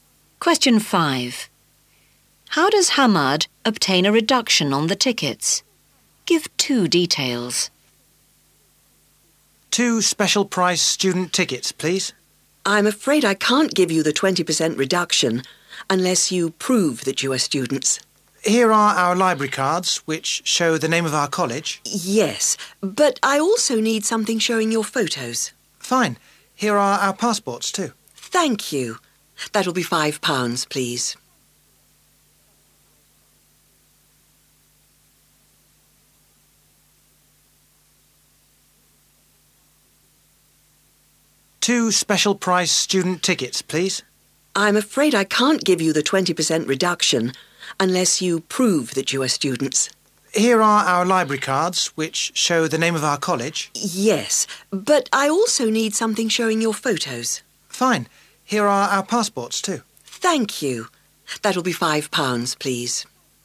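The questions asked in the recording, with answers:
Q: How does Hamad obtain a reduction on the tickets?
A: He shows library cards and passports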